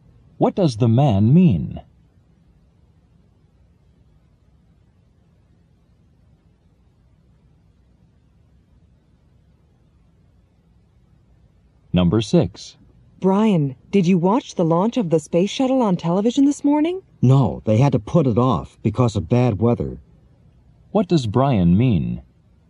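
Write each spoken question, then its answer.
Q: What does Brian mean?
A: The launch was postponed because of bad weather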